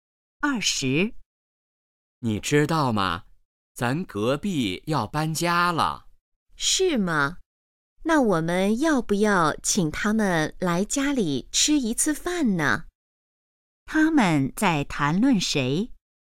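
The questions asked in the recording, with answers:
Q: 他们在谈论谁?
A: 隔壁邻居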